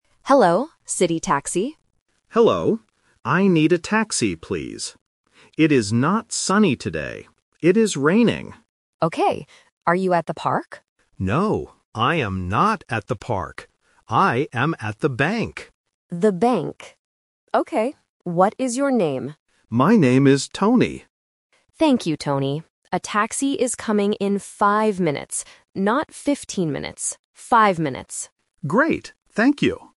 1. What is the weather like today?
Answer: Raining

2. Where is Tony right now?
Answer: At the bank

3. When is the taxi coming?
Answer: In 5 minutes